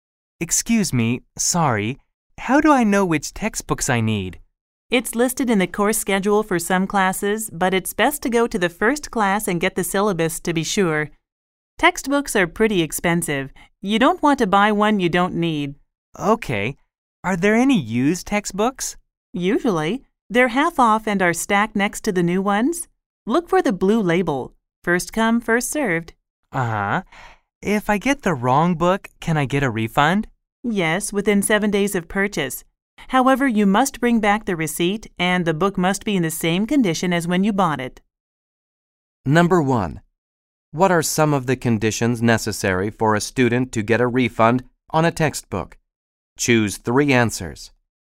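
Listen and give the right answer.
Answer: Return it within 7 days of purchase, bring back the receipt, and keep the book in the same condition as when it was bought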